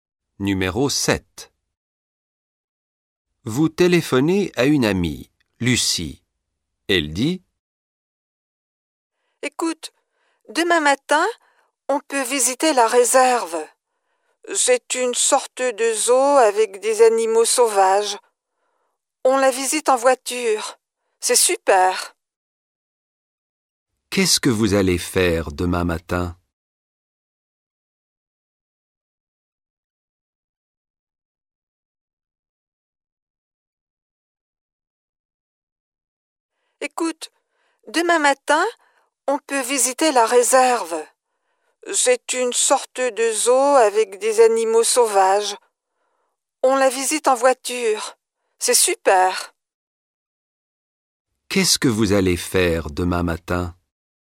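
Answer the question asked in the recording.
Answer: Visiter la réserve d'animaux sauvages en voiture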